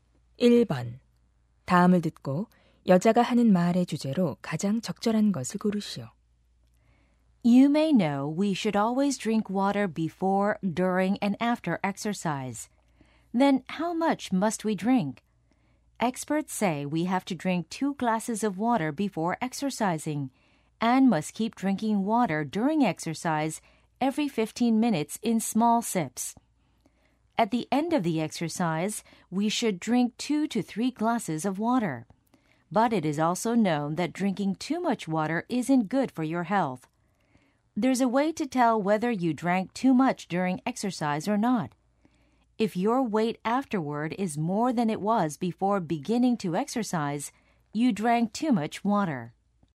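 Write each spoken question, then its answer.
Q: 다음을 듣고 여자가 하는 말의 주제로 가장 적절한 것을 고르시오.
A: 운동할 때 마셔야 할 적절한 물의 양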